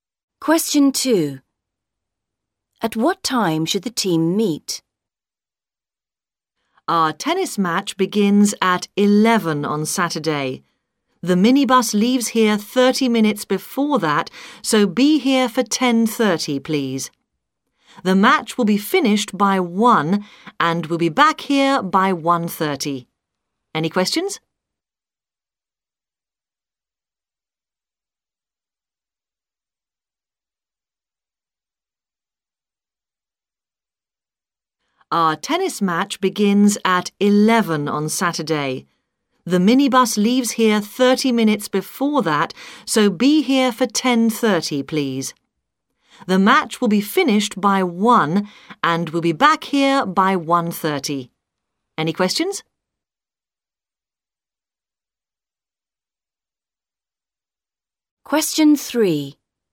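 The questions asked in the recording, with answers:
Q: At what time should the team meet?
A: 10:30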